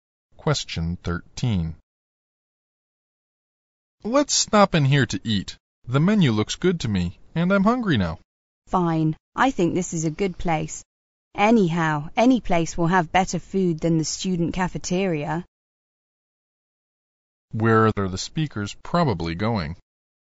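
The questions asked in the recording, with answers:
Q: Where are the speakers probably going?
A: To eat at a restaurant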